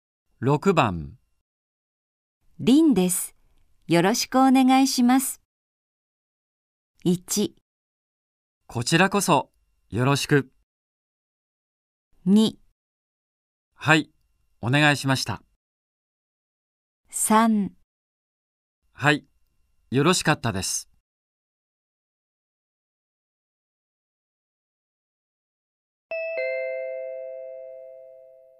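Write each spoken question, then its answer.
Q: 凛です。よろしくお願いします。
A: 1: こちらこそ、よろしく。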